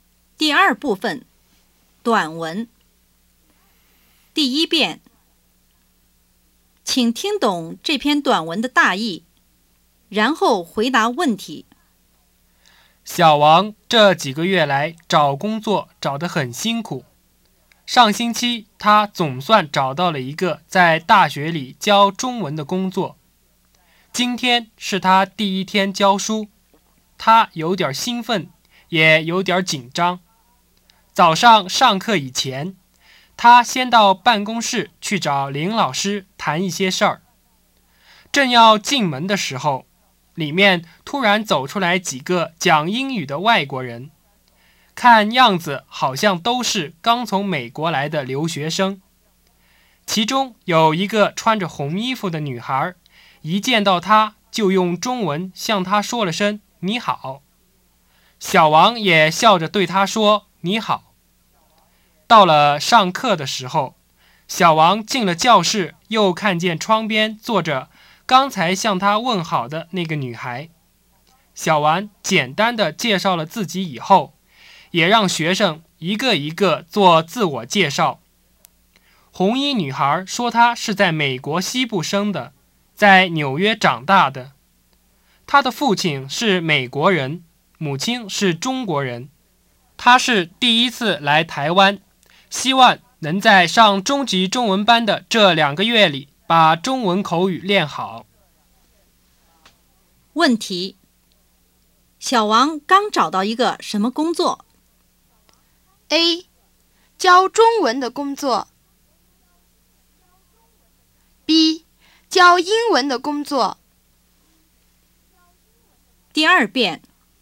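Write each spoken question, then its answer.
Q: 问题:小王刚找到一个什么工作?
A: A: 教中文的工作。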